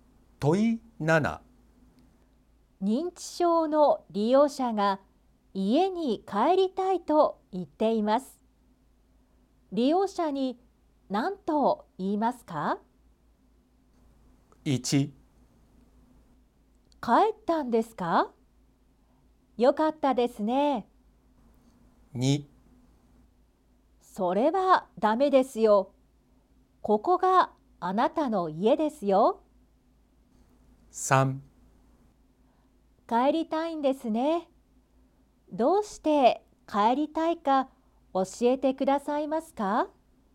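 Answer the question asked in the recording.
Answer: 3: 帰りたいんですね。どうして帰りたいか教えてくださいますか?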